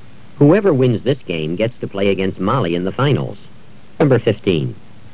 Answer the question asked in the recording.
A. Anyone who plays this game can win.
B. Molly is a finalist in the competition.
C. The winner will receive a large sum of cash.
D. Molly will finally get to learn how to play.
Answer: B. Molly is a finalist in the competition.

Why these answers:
Whoever wins this game gets to play against Molly in the finals.

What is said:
13. His art was appreciated by the younger people at the exhibit.
14. Whoever wins this game gets to play against Molly in the finals.